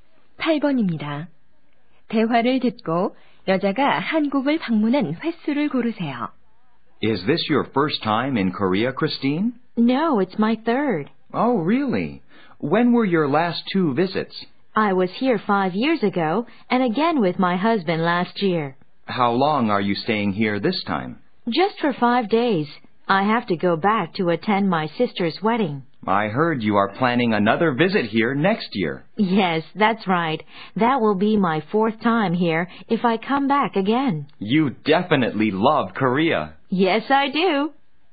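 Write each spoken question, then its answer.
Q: 대화를 듣고 여자가 한국을 방문한 횟수를 고르세요.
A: 3번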